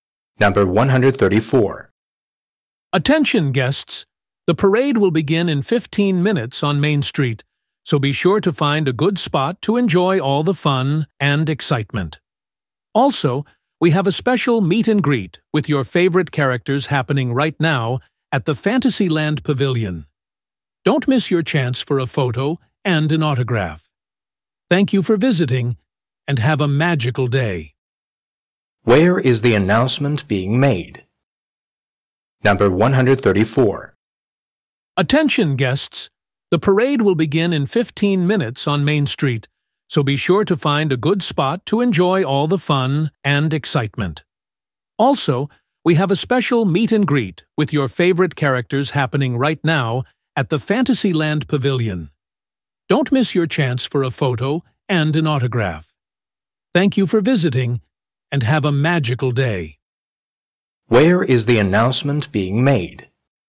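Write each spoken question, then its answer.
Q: Where is the announcement being made?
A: At an amusement park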